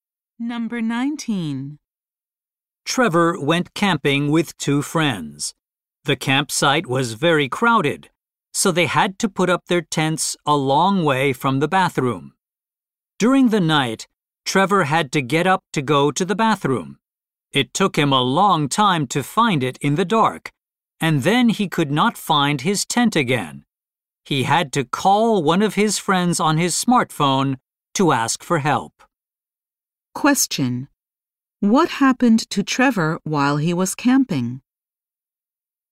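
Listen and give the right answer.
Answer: He could not find his tent in the dark after going to the bathroom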